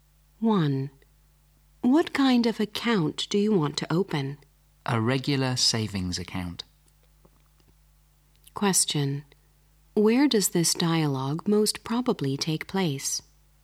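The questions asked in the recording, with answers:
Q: Where does this dialogue most probably take place?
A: In a bank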